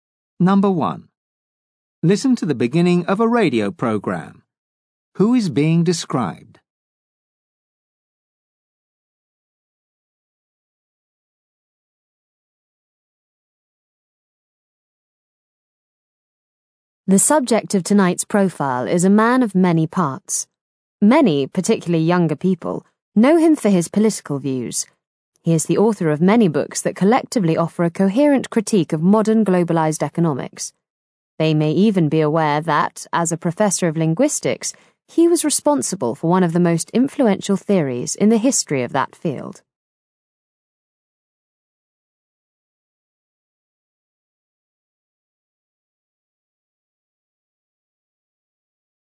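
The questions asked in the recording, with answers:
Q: Who is being described?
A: A linguistics professor and political author (critic of globalized economics)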